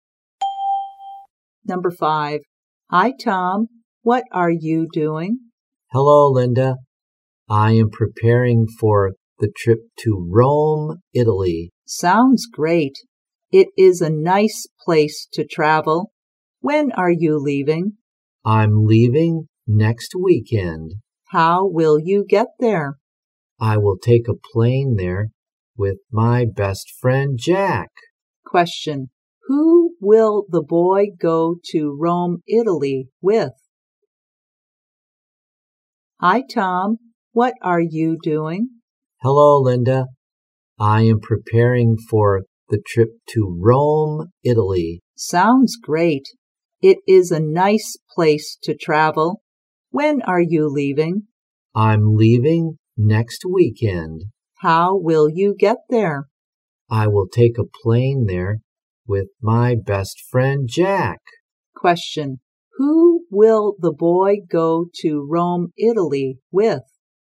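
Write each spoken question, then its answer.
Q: Who will the boy go to Rome, Italy with?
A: His best friend, Jack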